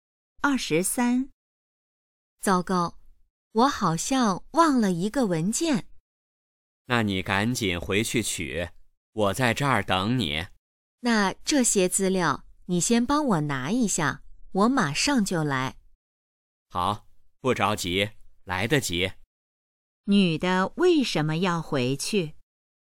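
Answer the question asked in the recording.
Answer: 忘了一个文件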